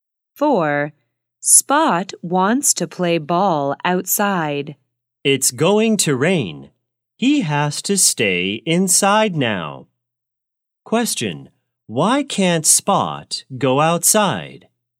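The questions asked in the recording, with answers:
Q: Why can't Spot go outside?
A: It's going to rain.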